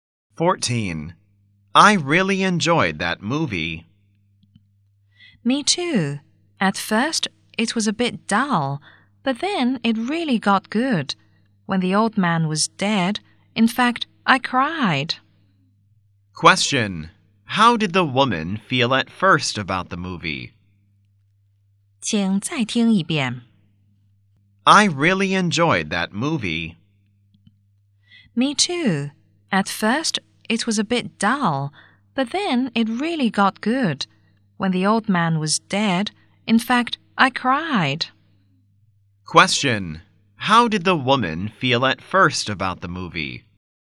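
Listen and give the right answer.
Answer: It was a bit dull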